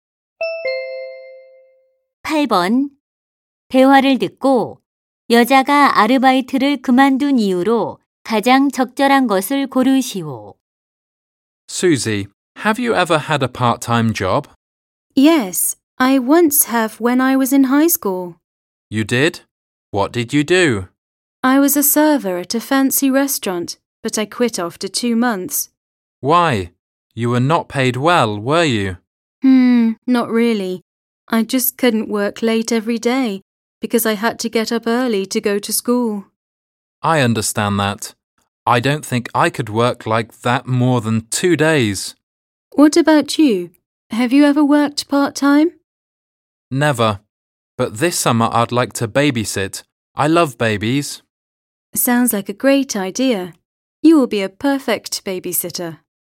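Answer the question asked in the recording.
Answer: 일찍 등교해야 해서 매일 늦게까지 일할 수 없었기 때문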